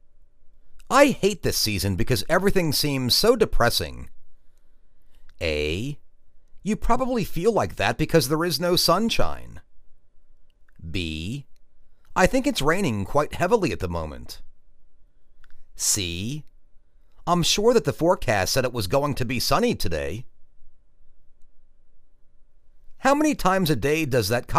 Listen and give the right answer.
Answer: You probably feel like that because there is no sunshine.